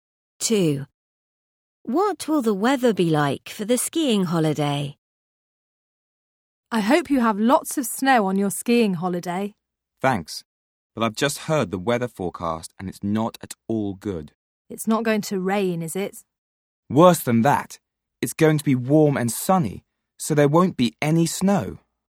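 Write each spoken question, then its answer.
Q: What will the weather be like for the skiing holiday?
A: Warm and sunny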